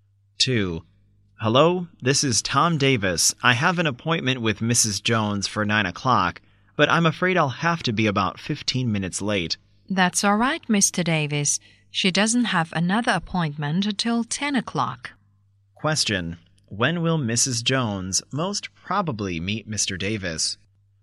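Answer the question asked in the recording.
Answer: At 9:15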